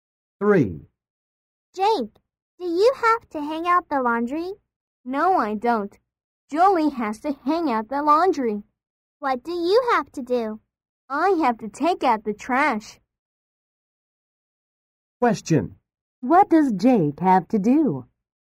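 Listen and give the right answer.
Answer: He has to take out the trash.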